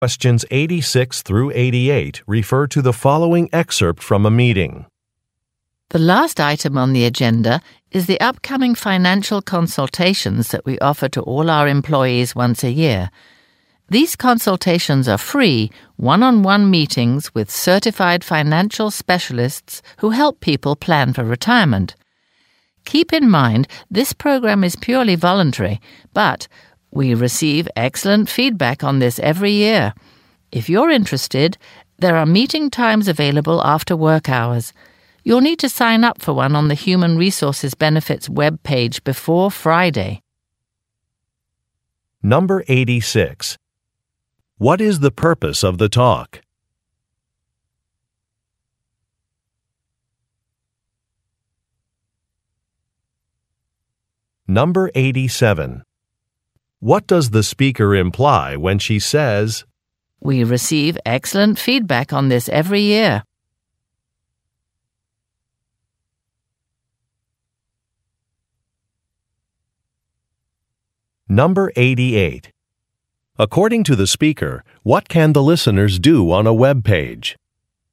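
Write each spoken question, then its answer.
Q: What is the purpose of the talk?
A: To announce upcoming free financial consultations for employees

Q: According to the speaker, what can the listeners do on a web page?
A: Sign up for a consultation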